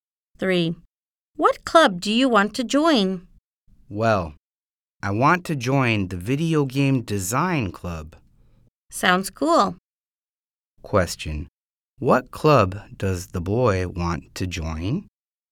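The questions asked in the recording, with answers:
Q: What club does the boy want to join?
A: The Video Game Design Club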